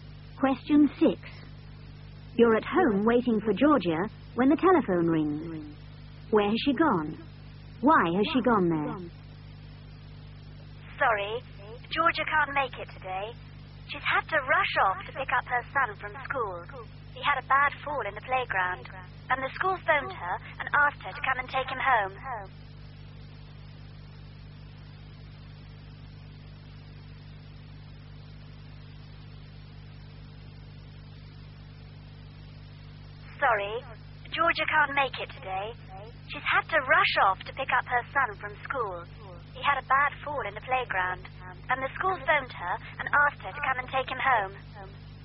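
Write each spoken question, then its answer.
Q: Where has she gone? Why has she gone there?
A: To her son's school, to take him home because he had a bad fall in the playground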